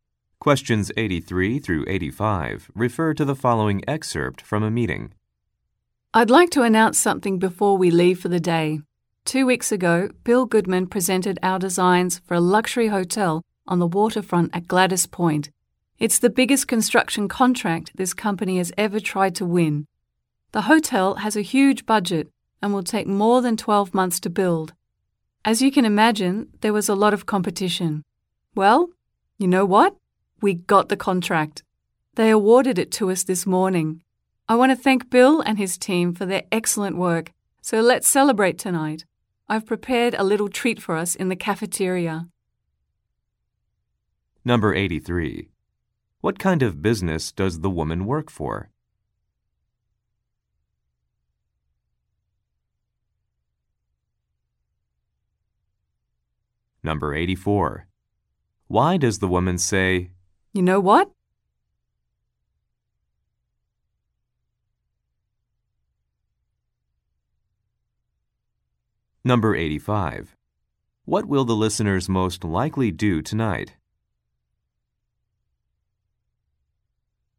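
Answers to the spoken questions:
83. A construction company
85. Celebrate in the cafeteria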